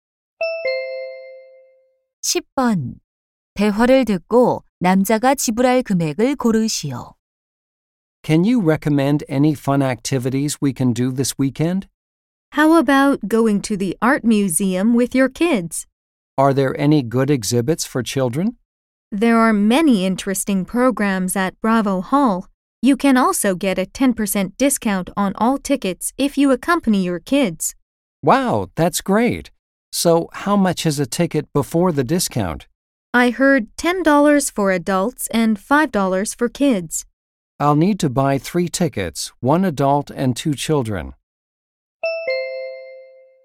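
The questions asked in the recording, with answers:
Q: 대화를 듣고 남자가 지불할 금액을 고르시오.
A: 18달러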